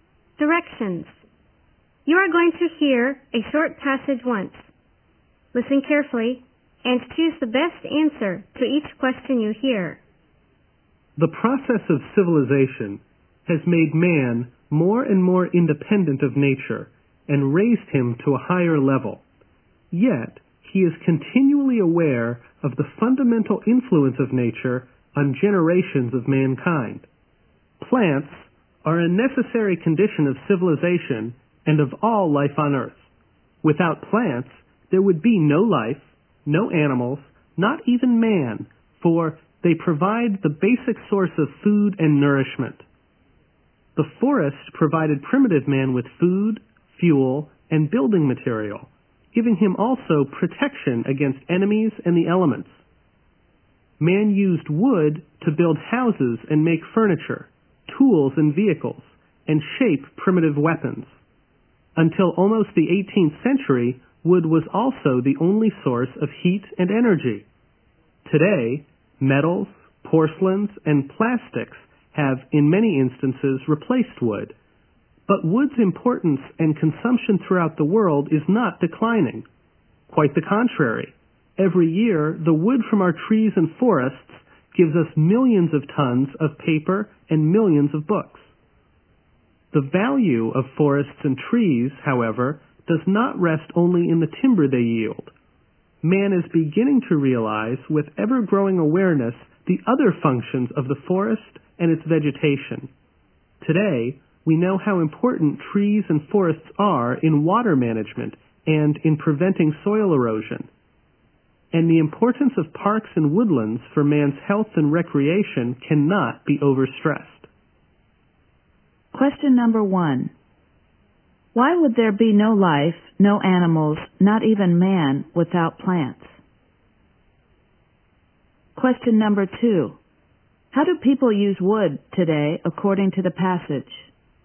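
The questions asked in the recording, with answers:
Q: Why would there be no life, no animals, not even man, without plants?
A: Plants provide the basic source of food and nourishment

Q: How do people use wood today, according to the passage?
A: To make paper and books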